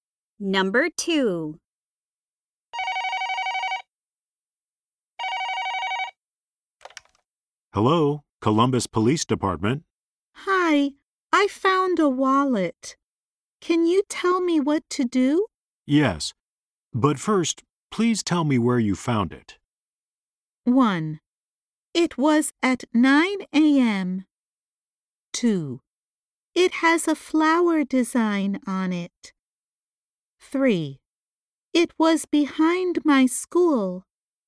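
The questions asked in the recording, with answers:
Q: Yes, but first, please tell me where you found it.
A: 3: It was behind my school.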